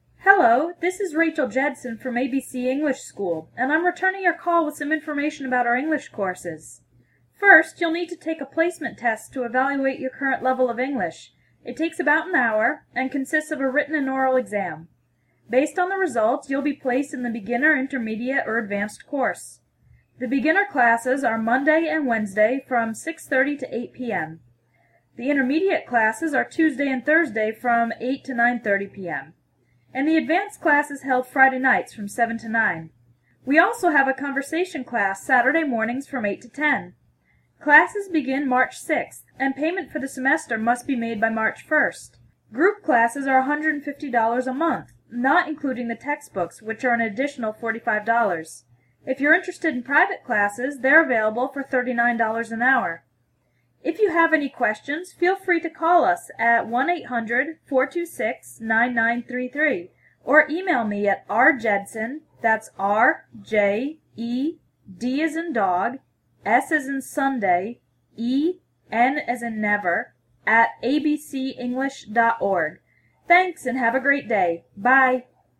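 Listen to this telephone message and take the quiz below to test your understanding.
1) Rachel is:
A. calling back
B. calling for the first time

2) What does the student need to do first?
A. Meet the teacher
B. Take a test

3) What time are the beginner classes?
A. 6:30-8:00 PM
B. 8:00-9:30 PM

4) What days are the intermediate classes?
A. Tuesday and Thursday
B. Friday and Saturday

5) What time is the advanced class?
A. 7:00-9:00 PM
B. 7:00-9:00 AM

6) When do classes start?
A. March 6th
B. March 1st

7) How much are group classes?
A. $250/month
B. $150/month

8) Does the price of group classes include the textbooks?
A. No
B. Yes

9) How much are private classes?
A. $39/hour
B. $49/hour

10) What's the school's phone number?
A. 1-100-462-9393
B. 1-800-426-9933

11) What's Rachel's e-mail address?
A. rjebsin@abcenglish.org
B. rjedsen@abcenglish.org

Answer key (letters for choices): 1A, 2B, 3A, 4A, 5A, 6A, 7B, 8A, 9A, 10B, 11B

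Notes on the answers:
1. She says, "I'm returning your call" - that means she is calling the person back.
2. "First, you'll need to take a placement test to evaluate your current level of English."
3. "The beginner classes are Monday and Wednesday from 6:30 to 8:00 PM."
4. "The intermediate classes are Tuesday and Thursday from 8:00 to 9:30 PM."
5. "The advanced class is held Friday nights from 7-9."
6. "Classes begin March 6th, and payment for the semester must be made by March 1st."
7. "Group classes are $150/month..."
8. "Group classes are $150/month, not including the textbooks, which are an additional $45."
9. "If you're interested in private classes, they're available for $39/hour."
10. "If you have any questions, feel free to call us at 1-800-426-9933."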